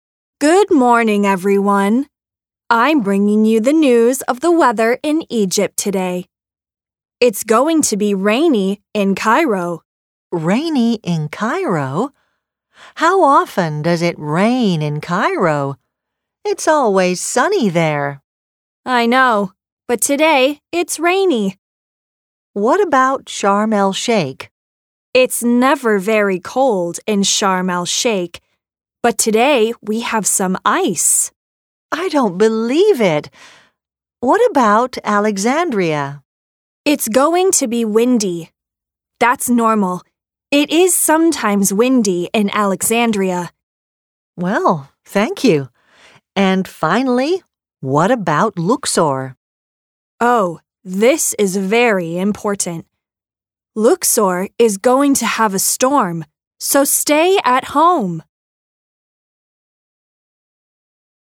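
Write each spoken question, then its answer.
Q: What are they talking about?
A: The weather in Egypt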